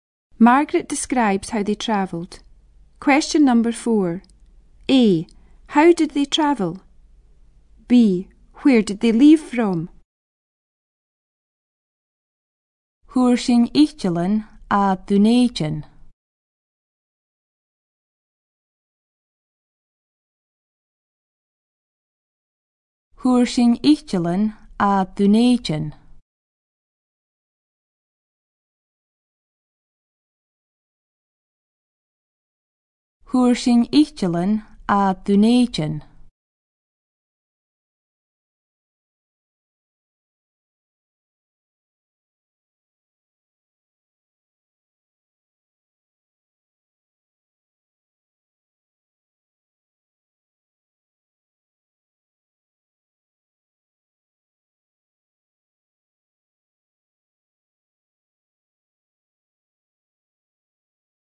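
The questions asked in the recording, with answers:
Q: A. How did they travel?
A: By plane

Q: B. Where did they leave from?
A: Edinburgh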